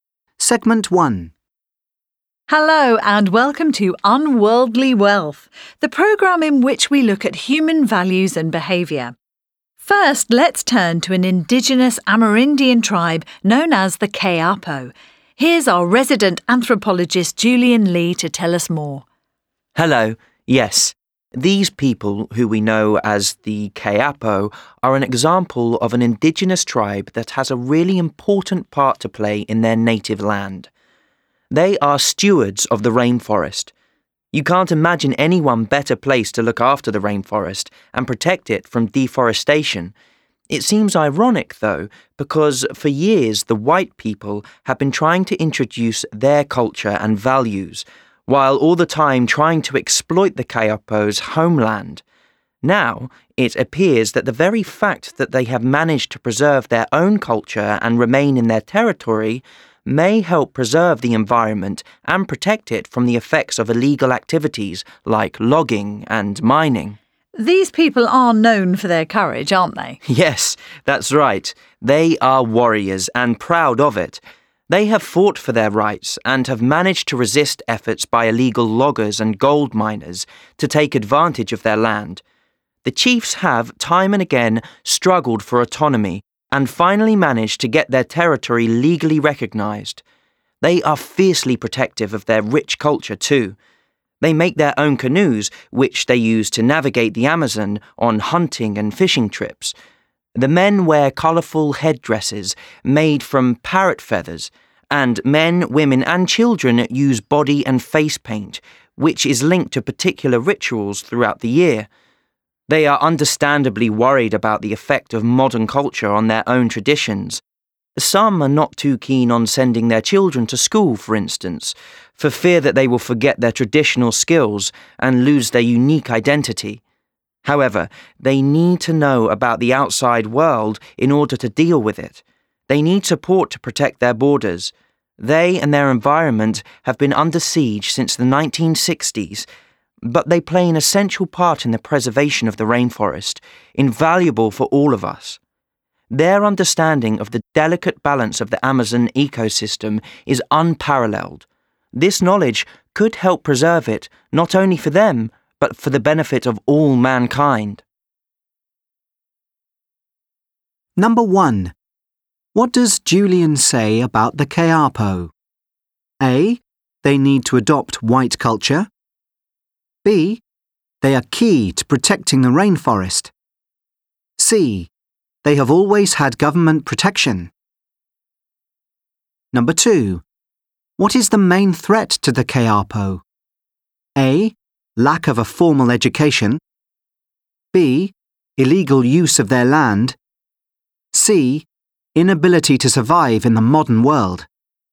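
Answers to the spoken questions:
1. B: They are key to protecting the rainforest.
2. B: Illegal use of their land.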